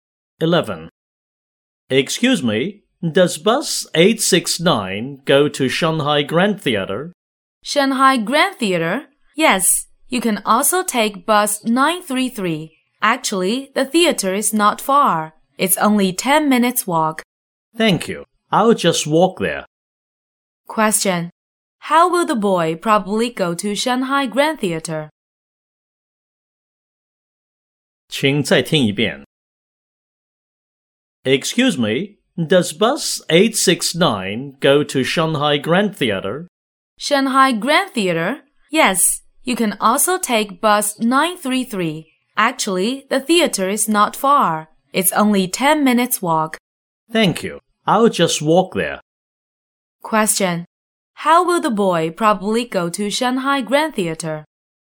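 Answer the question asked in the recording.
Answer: On foot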